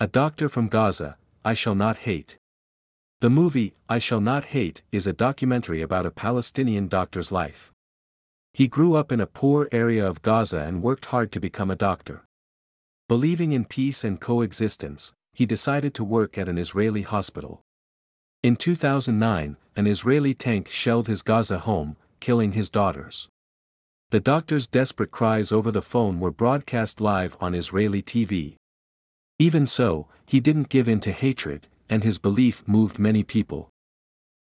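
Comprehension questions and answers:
次の各質問の答えを探しながら聞きましょう。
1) Who is the main person in the documentary I Shall Not Hate?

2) What happened to the doctor's family in 2009?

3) How did the doctor respond to this tragedy?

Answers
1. A Palestinian doctor from Gaza
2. An Israeli tank shelled his Gaza home, killing his daughters.
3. He didn't give in to hatred.

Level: 中級脱出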